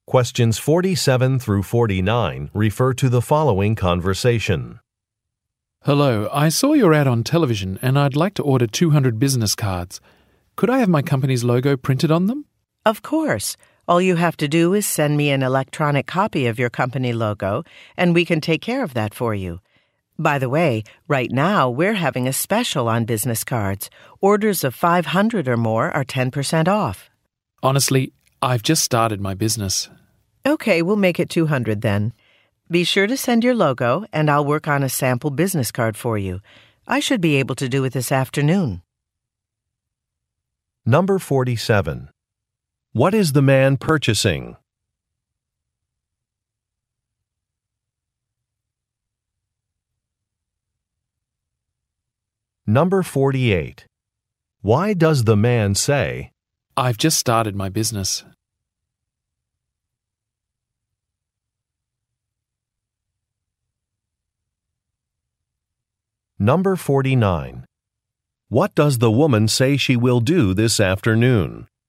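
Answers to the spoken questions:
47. Business cards (200)
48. To decline the larger discounted order, because he doesn't need 500 cards
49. Make a sample business card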